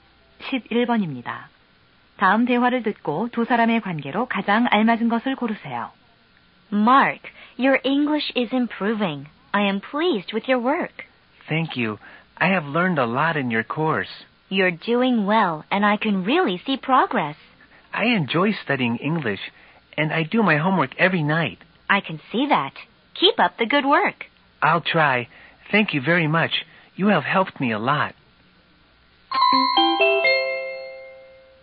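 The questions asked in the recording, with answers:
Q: 다음 대화를 듣고 두 사람의 관계로 가장 알맞은 것을 고르세요.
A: 교사와 학생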